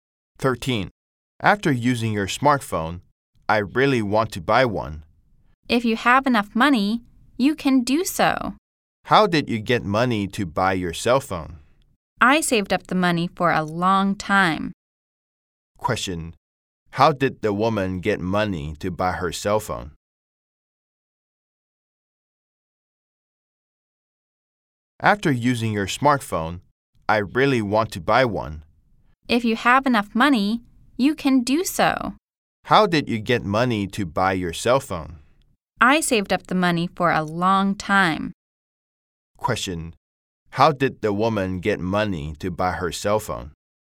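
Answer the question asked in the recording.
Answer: She saved up the money for a long time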